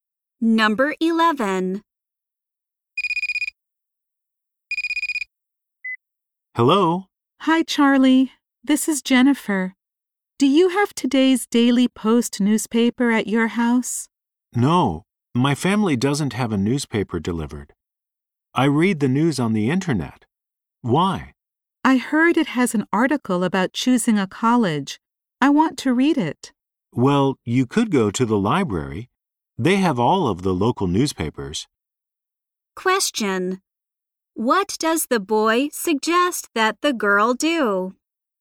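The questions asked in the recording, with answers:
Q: What does the boy suggest that the girl do?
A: Go to the library.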